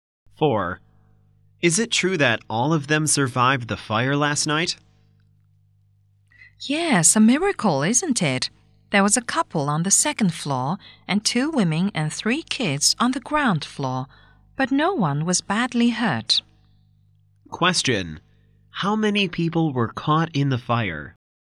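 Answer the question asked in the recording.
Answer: Seven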